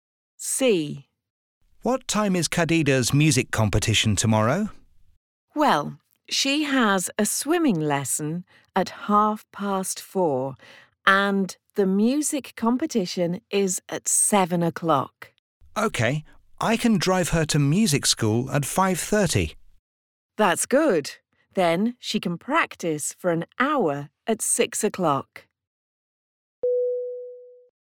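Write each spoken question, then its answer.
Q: What time is Khadija's music competition tomorrow?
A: 7:00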